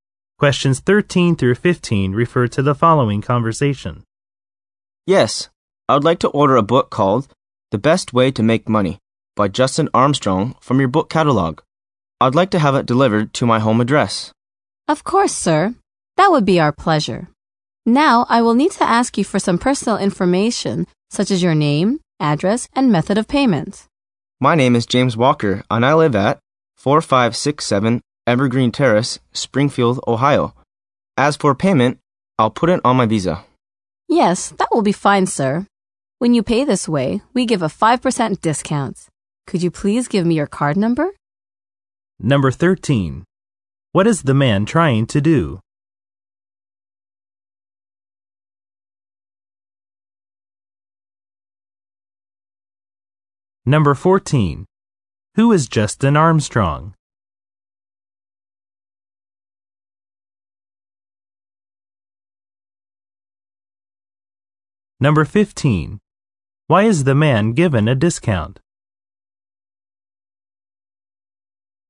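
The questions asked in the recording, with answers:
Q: What is the man trying to do?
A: Order a book from a catalog

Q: Who is Justin Armstrong?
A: The author of the book

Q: Why is the man given a discount?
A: He is paying by credit card (Visa)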